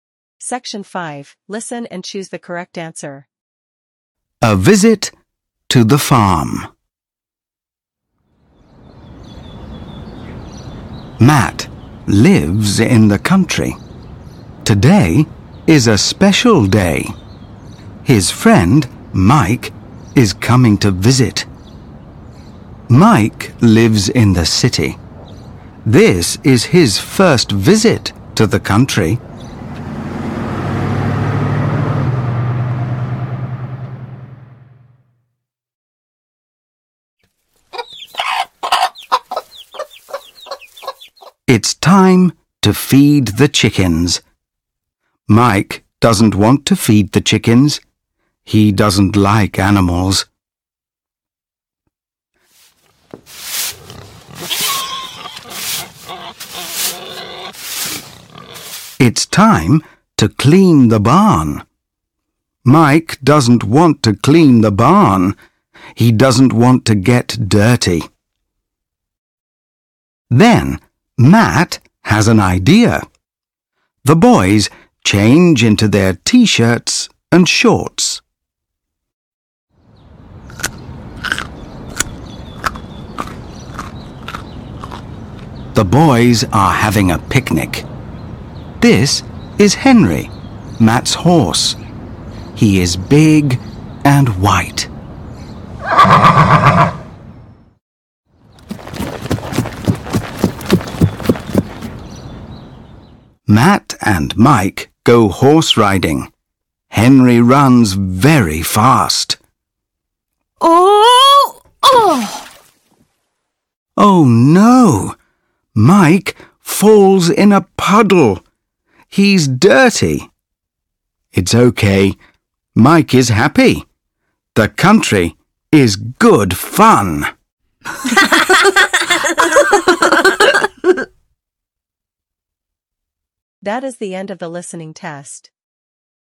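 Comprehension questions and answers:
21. Where does Matt live?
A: In the country

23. Why doesn't Mike clean the barn?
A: He doesn't want to get dirty

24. What do the boys change into?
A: T-shirts and shorts

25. What is the color of Matt's horse?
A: White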